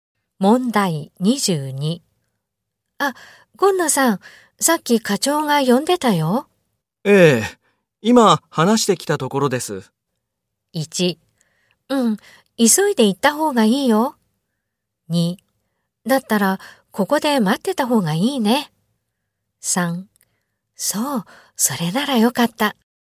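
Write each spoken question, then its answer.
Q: ええ、今話してきたところです。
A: 3: そう、それならよかった。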